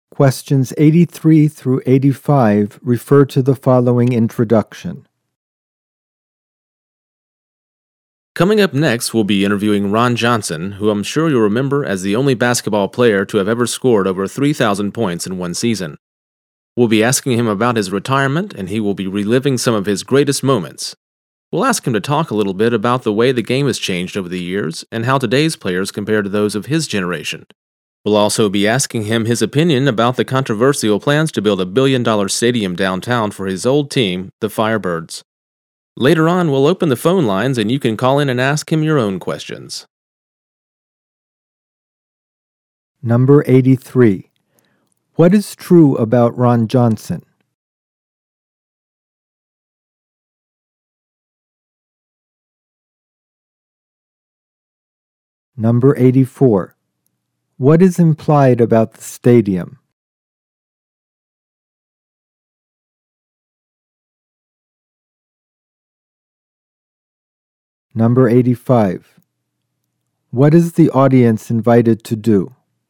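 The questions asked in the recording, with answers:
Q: What is true about Ron Johnson?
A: He is a retired basketball player who once scored over 3,000 points in a season

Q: What is implied about the stadium?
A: The plans to build it are controversial

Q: What is the audience invited to do?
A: Call in and ask him questions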